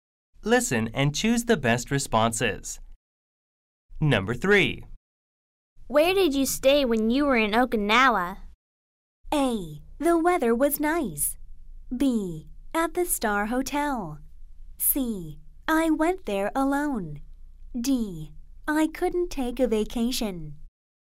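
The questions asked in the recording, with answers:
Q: Where did you stay when you were in Okinawa?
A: B: At the Star Hotel.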